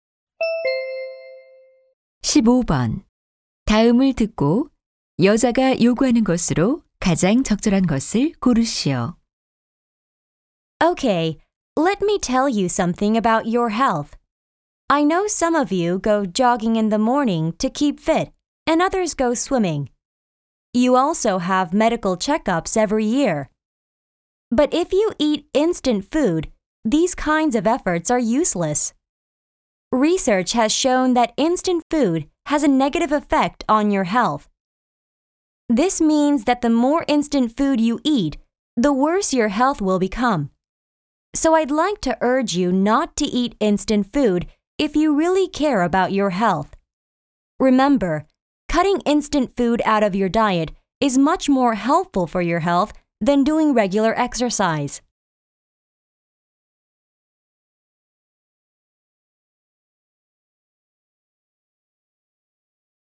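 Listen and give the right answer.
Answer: 인스턴트 식품을 먹지 말 것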